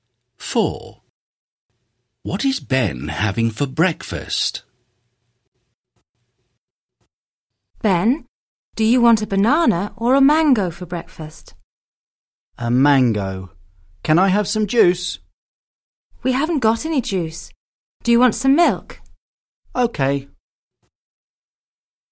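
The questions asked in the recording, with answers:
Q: What is Ben having for breakfast?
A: a mango and some milk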